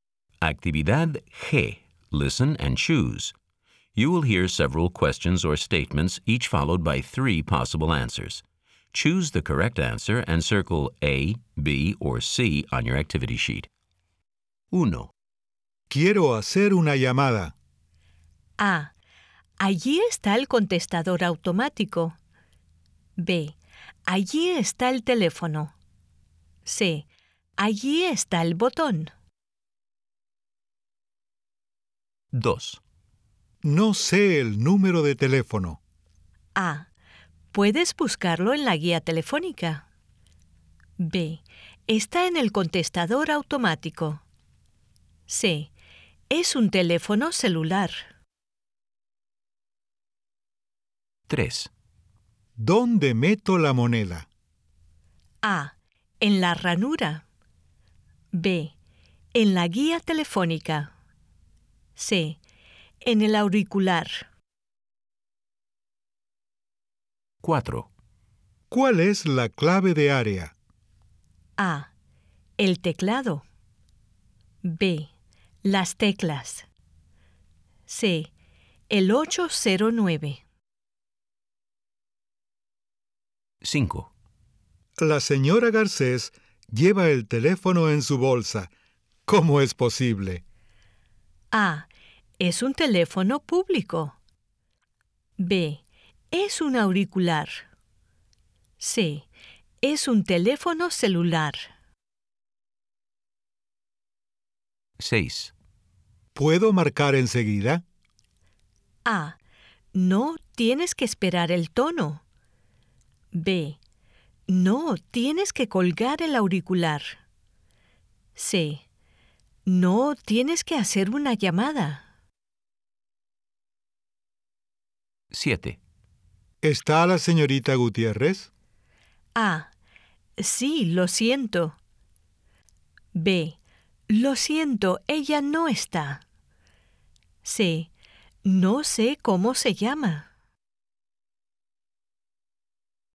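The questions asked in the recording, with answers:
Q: Quiero hacer una llamada.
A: B: Allí está el teléfono.

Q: No sé el número de teléfono.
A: A: Puedes buscarlo en la guía telefónica.

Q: ¿Dónde meto la moneda?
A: A: En la ranura.

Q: ¿Cuál es la clave de área?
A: C: El 809.

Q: La señora Garcés lleva el teléfono en su bolsa. ¿Cómo es posible?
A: C: Es un teléfono celular.

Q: ¿Puedo marcar enseguida?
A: A: No, tienes que esperar el tono.

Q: ¿Está la señorita Gutiérrez?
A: B: Lo siento, ella no está.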